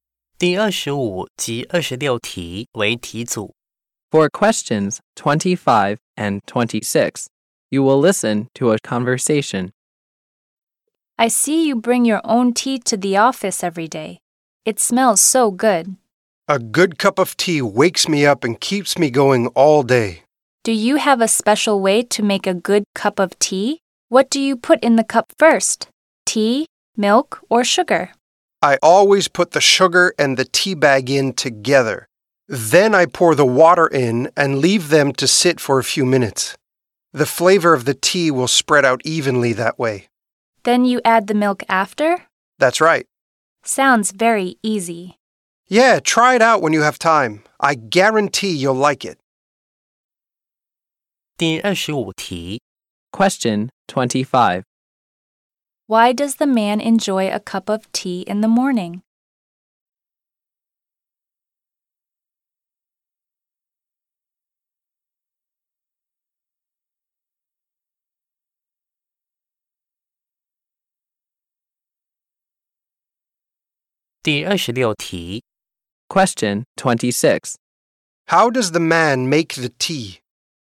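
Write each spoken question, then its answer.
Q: Why does the man enjoy a cup of tea in the morning?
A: It wakes him up and keeps him going all day.

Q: How does the man make the tea?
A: He puts the sugar and tea bag in together, adds water, lets it sit, then adds milk.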